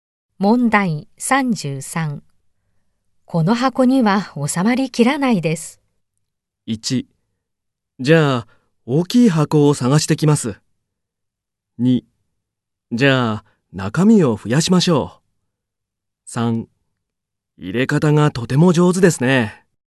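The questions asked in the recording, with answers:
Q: この箱には収まりきらないです。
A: 1: じゃあ大きい箱を探してきます。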